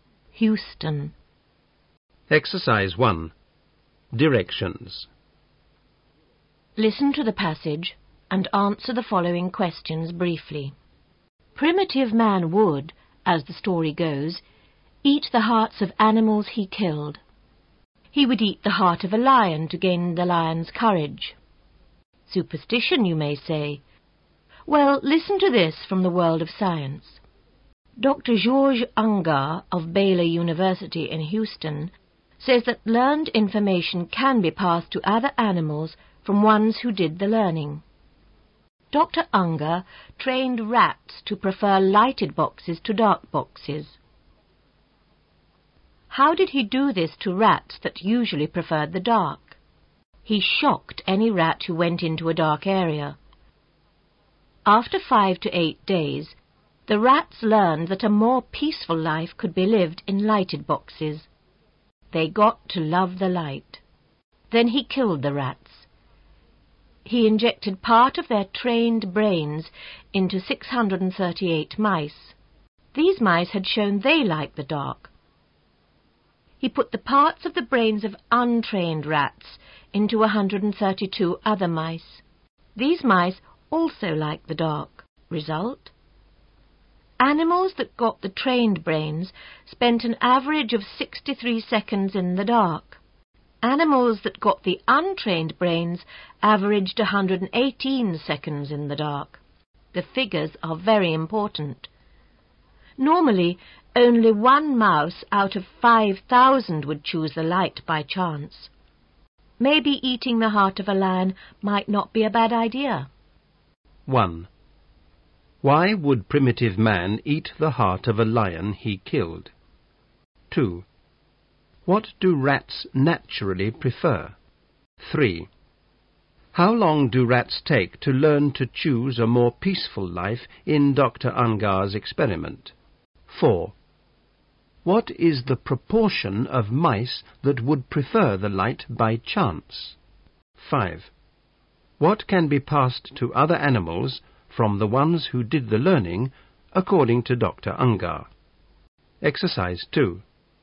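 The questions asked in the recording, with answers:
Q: Why would primitive man eat the heart of a lion he killed?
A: To gain the lion's courage

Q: What do rats naturally prefer?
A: The dark

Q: How long do rats take to learn to choose a more peaceful life in Dr.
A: 5 to 8 days

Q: What is the proportion of mice that would prefer the light by chance?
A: One out of 5,000

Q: What can be passed to other animals from the ones who did the learning, according to Dr.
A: Learned information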